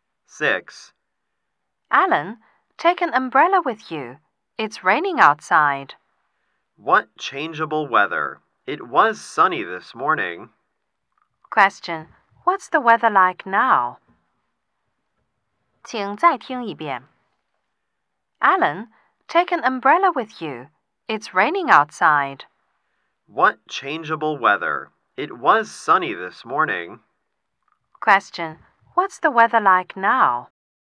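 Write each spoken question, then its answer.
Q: Question, what's the weather like now?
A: It's raining.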